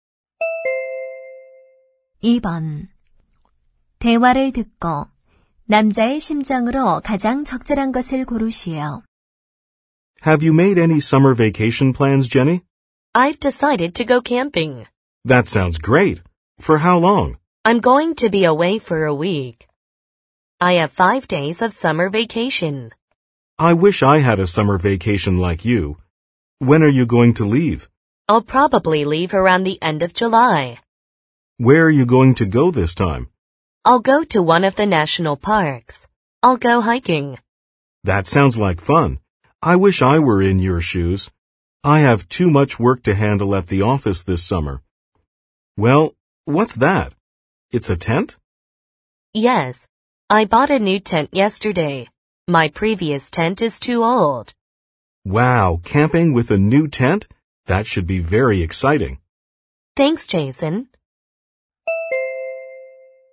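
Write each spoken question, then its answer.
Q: 대화를 듣고 남자의 심정으로 가장 적절한 것을 고르시오.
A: 부러움 (envious)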